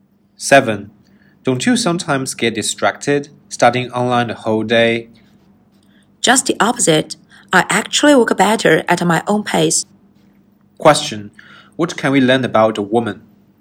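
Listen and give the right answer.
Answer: She works better studying online at her own pace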